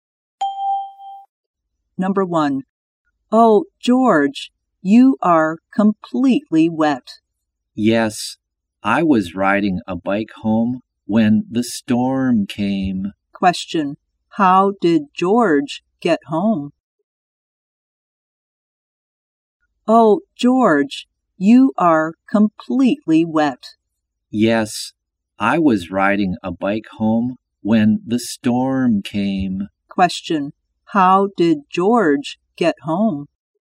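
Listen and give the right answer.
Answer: By bike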